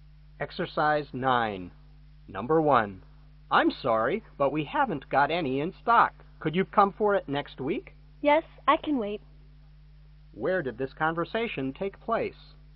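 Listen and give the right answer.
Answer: In a store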